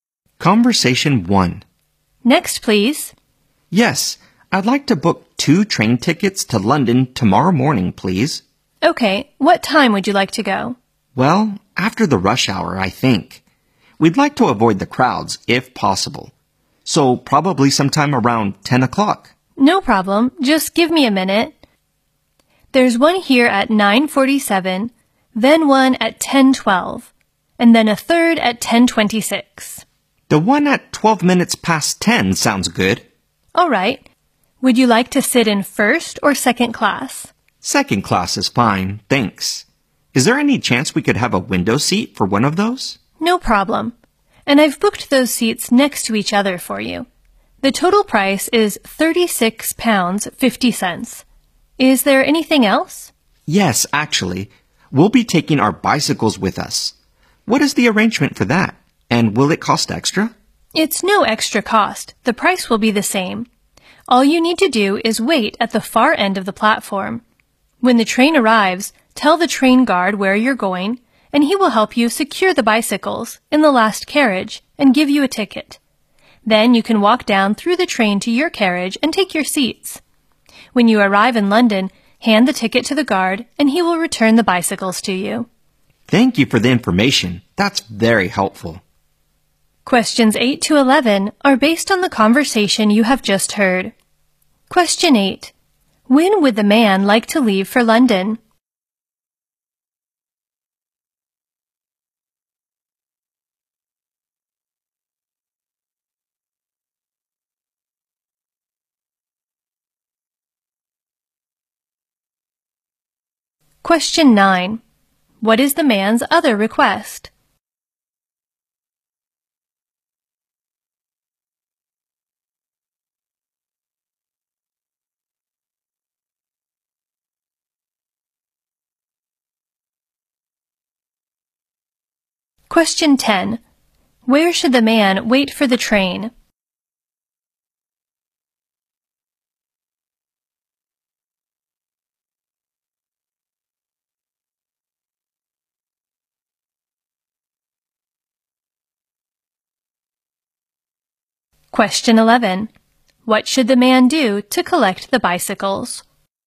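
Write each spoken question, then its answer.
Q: When would the man like to leave for London?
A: Tomorrow morning after the rush hour, on the 10:12 train

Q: What is the man's other request?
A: To take their bicycles on the train

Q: Where should the man wait for the train?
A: At the far end of the platform

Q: What should the man do to collect the bicycles?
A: Hand the ticket to the guard in London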